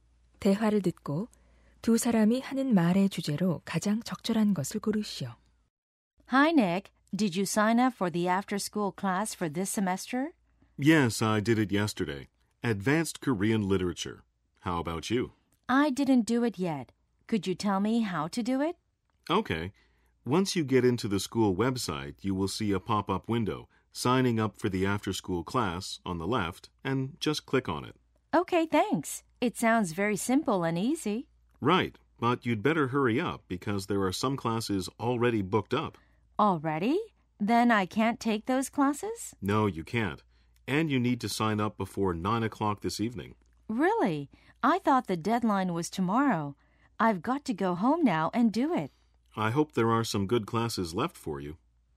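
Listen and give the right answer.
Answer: 방과후 수업 신청 방법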